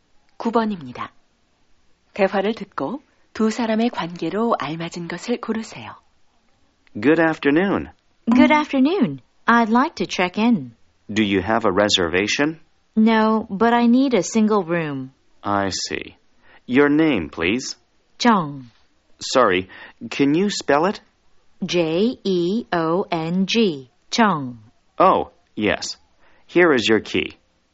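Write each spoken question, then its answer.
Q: 대화를 듣고 두 사람의 관계로 알맞은 것을 고르세요.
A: 호텔 직원과 투숙객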